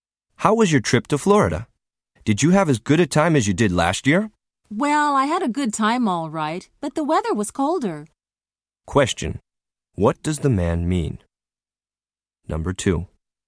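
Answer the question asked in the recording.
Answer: He enjoyed the trip, but the weather was colder than last year.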